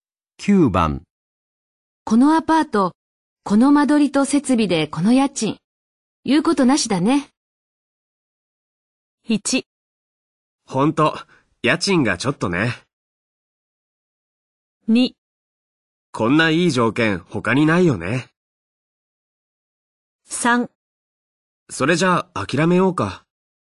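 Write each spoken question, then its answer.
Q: このアパート、この間取りと設備でこの家賃、言うことなしだね。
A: 2: こんないい条件他にないよね。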